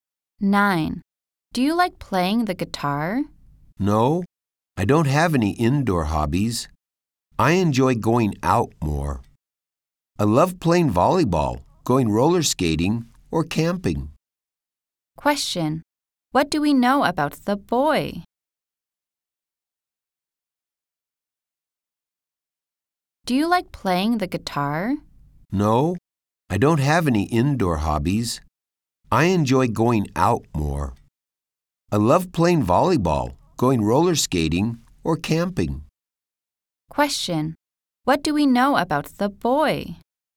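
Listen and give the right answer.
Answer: He likes outdoor activities.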